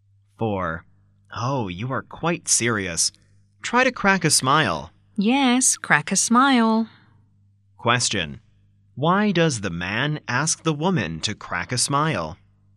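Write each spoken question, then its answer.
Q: Why does the man ask the woman to crack a smile?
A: Because she looks too serious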